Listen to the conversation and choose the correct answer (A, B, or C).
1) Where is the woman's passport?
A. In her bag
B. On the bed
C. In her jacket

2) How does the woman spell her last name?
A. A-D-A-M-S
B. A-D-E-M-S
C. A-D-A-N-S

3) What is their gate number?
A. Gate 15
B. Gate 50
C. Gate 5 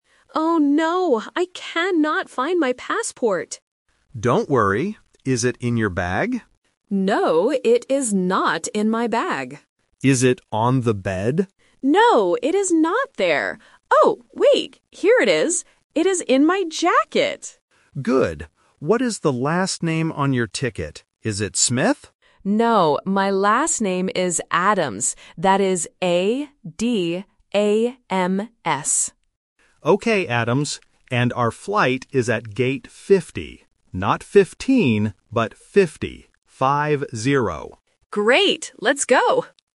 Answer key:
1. C
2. A
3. B

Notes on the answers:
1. The woman finally says, "It is in my jacket." Options (A) and (B) are the traps. The man asks about the bag and the bed, but the woman uses negative sentences: "No, it is not in my bag," and "No, it is not there."
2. The woman spells her last name clearly: A-D-A-M-S. Option (B) uses the wrong vowel "E", and Option (C) uses the letter "N" instead of "M", which is a common listening mistake.
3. The man says their flight is at gate 50. He also warns, "Not 15, but 50. Five-zero." Option (A) is the trap for students who confuse the "-teen" and "-ty" sounds. Option (C) is a common distractor for the number 50.

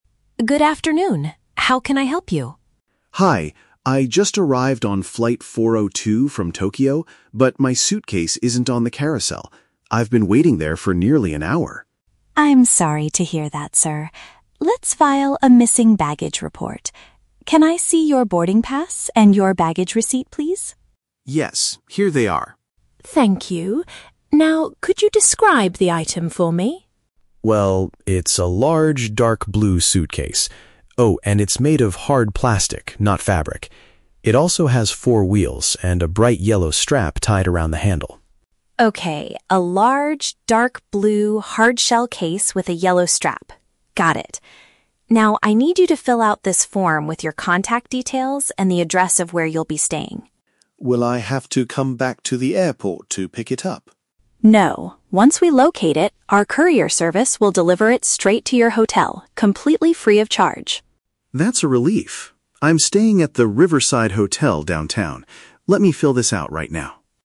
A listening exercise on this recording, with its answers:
Listen to the conversation between a passenger and an airport worker. Choose the correct answer (A, B, or C) for each question.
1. What is the main problem the man is facing?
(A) He has lost his boarding pass and receipt.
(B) His luggage did not arrive at the baggage claim area.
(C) He missed his flight back to Tokyo.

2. Which of the following describes the man's suitcase?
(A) It is a blue case made of fabric with four wheels.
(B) It is a large, yellow suitcase made of hard plastic.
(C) It is a hard, blue bag with a yellow tie on the handle.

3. What will happen after the airport staff finds the suitcase?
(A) The passenger will have to pay a delivery fee to get it.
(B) It will be brought directly to where the passenger is staying.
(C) The passenger must return to the airport to collect it.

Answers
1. B
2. C
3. B

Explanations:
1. The man says, "my suitcase isn't on the carousel." A carousel is the moving belt where you pick up your bags. This means his luggage is missing.
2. The man describes his suitcase as "dark blue," "made of hard plastic," and having a "yellow strap tied around the handle." Option (C) correctly paraphrases these details.
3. The staff member tells him that a courier service will "deliver it straight to your hotel." Option (B) uses synonyms to express this exact idea.

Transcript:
Staff: Good afternoon. How can I help you?
Passenger: Hi, I just arrived on flight 402 from Tokyo, but my suitcase isn't on the carousel. I've been waiting there for nearly an hour.
Staff: I'm sorry to hear that, sir. Let's file a missing baggage report. Can I see your boarding pass and your baggage receipt, please?
Passenger: Yes, here they are.
Staff: Thank you. Now, could you describe the item for me?
Passenger: Well, it's a large, dark blue suitcase. Oh, and it's made of hard plastic, not fabric. It also has four wheels and a bright yellow strap tied around the handle.
Staff: Okay, a large, dark blue hard-shell case with a yellow strap. Got it. Now, I need you to fill out this form with your contact details and the address of where you'll be staying.
Passenger: Will I have to come back to the airport to pick it up?
Staff: No. Once we locate it, our courier service will deliver it straight to your hotel, completely free of charge.
Passenger: That's a relief. I'm staying at the Riverside Hotel downtown. Let me fill this out right now.

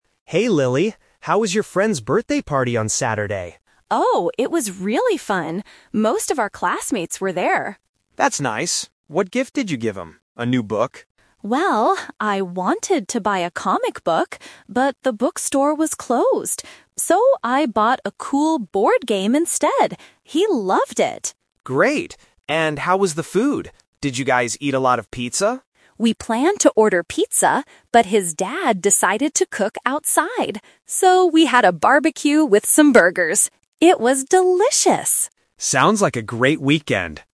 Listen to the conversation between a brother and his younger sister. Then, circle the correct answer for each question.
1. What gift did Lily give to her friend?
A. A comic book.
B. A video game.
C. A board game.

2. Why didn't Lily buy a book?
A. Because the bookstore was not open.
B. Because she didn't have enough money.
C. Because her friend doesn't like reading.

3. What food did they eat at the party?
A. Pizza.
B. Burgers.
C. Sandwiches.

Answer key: 1C, 2A, 3B

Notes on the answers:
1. Lily says, "So, I bought a cool board game instead." Option (A) is a trap; she wanted to buy a comic book, but she couldn't. Option (B) is a plausible distracter but is never mentioned.
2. Lily explains her reason clearly: "I wanted to buy a comic book, but the bookstore was closed." "Closed" means it was not open. Options (B) and (C) are not mentioned in the audio.
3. Lily says, "So, we had a barbecue with some burgers." Option (A) is the trap; they planned to order pizza, but the plan changed because the dad decided to cook outside. Option (C) is never mentioned.

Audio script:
Brother: Hey, Lily. How was your friend's birthday party on Saturday?
Sister: Oh, it was really fun! Most of our classmates were there.
Brother: That's nice. What gift did you give him? A new book?
Sister: Well, I wanted to buy a comic book, but the bookstore was closed. So, I bought a cool board game instead. He loved it!
Brother: Great! And how was the food? Did you guys eat a lot of pizza?
Sister: We planned to order pizza, but his dad decided to cook outside. So, we had a barbecue with some burgers. It was delicious!
Brother: Sounds like a great weekend!

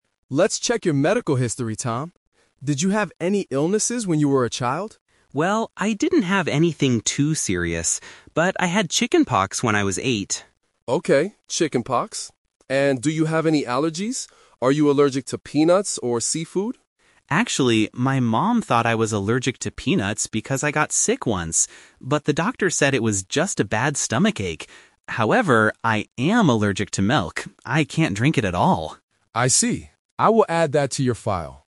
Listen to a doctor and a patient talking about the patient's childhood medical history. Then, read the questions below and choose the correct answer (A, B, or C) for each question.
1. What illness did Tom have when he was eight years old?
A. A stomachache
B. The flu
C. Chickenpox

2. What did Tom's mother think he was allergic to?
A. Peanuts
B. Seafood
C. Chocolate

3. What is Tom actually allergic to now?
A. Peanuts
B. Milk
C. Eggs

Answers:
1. C
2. A
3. B

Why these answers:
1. Tom says clearly, "But I had chickenpox when I was eight." Option (A) is a trap; a stomachache is mentioned later in the audio, but it is not the illness he had when he was eight. Option (B) is a common childhood illness, but it is never mentioned.
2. Tom states, "Actually, my mom thought I was allergic to peanuts..." Option (B) is a trap; the doctor asks about seafood, but Tom's mother did not think he was allergic to it. Option (C) is a plausible allergy, but it is not mentioned in the conversation.
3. Tom uses the word "However" to give the real information: "However, I am allergic to milk." Option (A) is a trap; peanuts are mentioned, but he is not actually allergic to them (it was just a stomachache). Option (C) is a plausible food allergy, but it is never mentioned.

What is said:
Doctor: Let's check your medical history, Tom. Did you have any illnesses when you were a child?
Tom: Well, I didn't have anything too serious. But I had chickenpox when I was eight.
Doctor: Okay, chickenpox. And do you have any allergies? Are you allergic to peanuts or seafood?
Tom: Actually, my mom thought I was allergic to peanuts because I got sick once. But the doctor said it was just a bad stomachache. However, I am allergic to milk. I can't drink it at all.

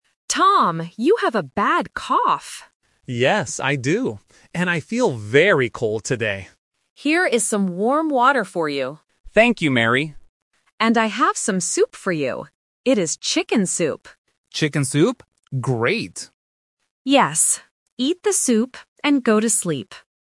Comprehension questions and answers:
Listen to the conversation. Circle the correct answer (A, B, or C).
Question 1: How does Tom feel?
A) He feels hot.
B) He feels old.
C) He feels cold.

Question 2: What food does Mary give Tom?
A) Chicken soup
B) Tomato soup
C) Chicken salad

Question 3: What does Mary tell Tom to do?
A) Eat the soup and go to work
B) Eat the soup and go to sleep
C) Go to see a doctor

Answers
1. C
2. A
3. B

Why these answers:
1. Tom explicitly says, "I feel very cold today." Option B ("old") is a phonetic trap because it sounds very similar to "cold". Option A ("hot") is a trap using the opposite meaning of his symptom.
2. Mary repeats the phrase "chicken soup" twice. Option B (Tomato soup) is a plausible food but not mentioned. Option C (Chicken salad) is a trap because it uses the word "chicken" but is the wrong type of food.
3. At the end of the conversation, Mary says exactly, "Eat the soup and go to sleep." Option A is a trap because it mentions "eat the soup" but ends with the wrong action ("go to work"). Option C is a logical thing to do when sick, but Mary does not say it in the audio.

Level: A1

